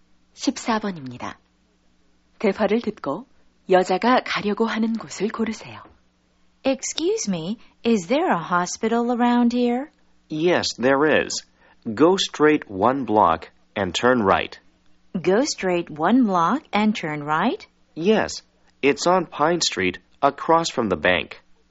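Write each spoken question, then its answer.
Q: 대화를 듣고 여자가 가려고 하는 곳을 고르세요.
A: 병원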